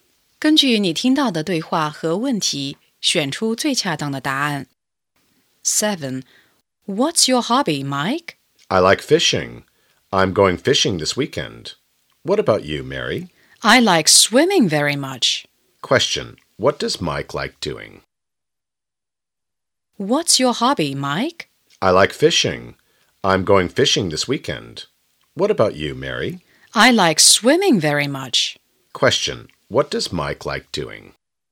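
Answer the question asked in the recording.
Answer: Fishing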